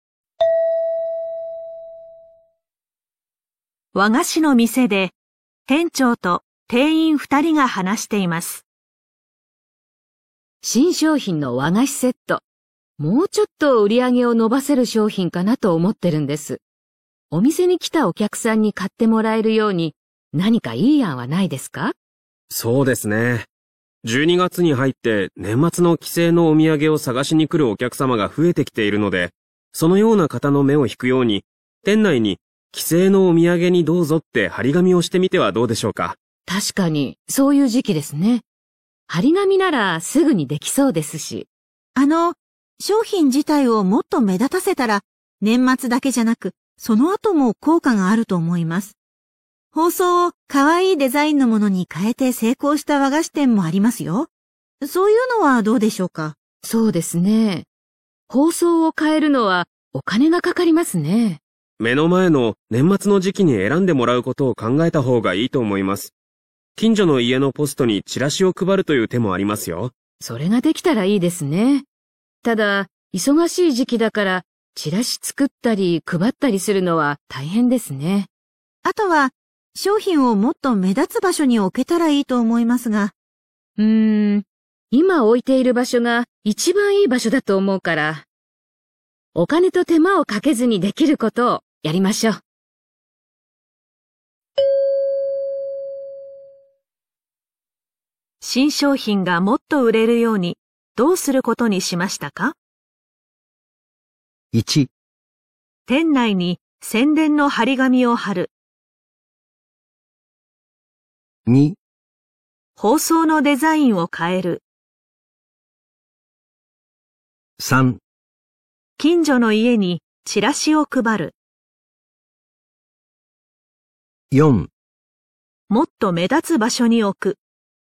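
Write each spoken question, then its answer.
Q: 新商品がもっと売れるようにどうすることにしましたか?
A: 1: 店内に宣伝の張り紙を貼る。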